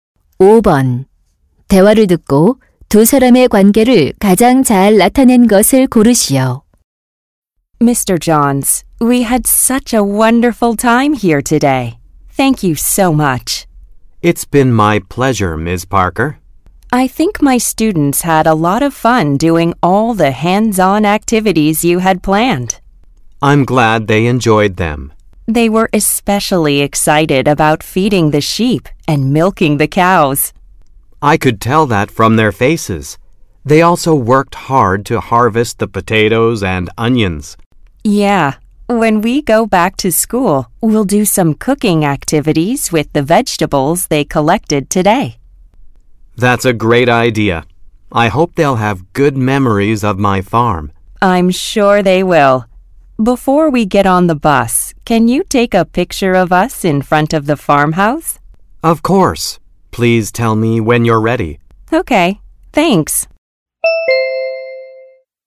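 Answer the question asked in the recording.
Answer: 교사 – 농장 주인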